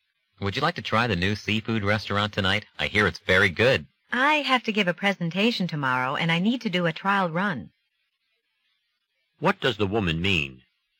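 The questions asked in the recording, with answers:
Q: What does the woman mean?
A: She can't go to the restaurant tonight because she has to practice her presentation.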